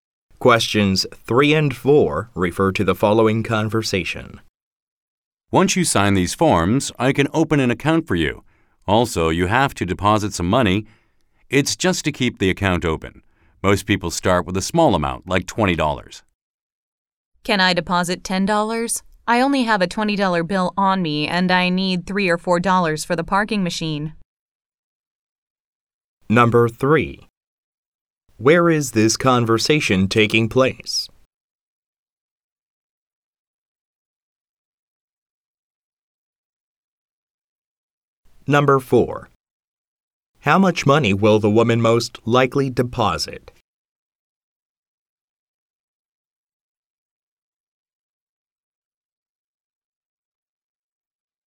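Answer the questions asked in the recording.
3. At a bank
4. $10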